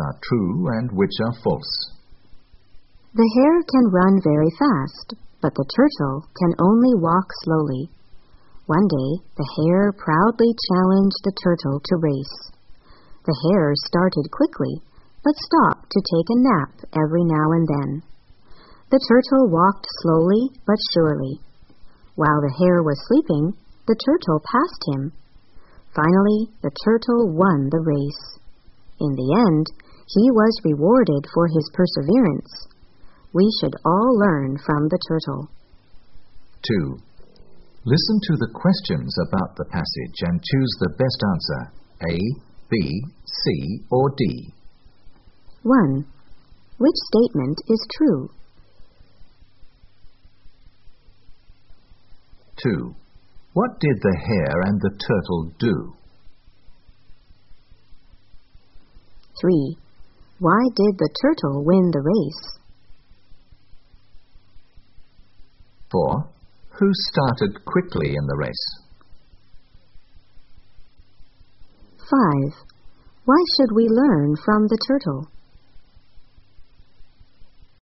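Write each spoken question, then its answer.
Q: What did the hare and the turtle do?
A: They had a race.

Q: Why did the turtle win the race?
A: The hare stopped to nap, and the turtle kept going slowly but surely.

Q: Who started quickly in the race?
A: The hare

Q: Why should we learn from the turtle?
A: Because of his perseverance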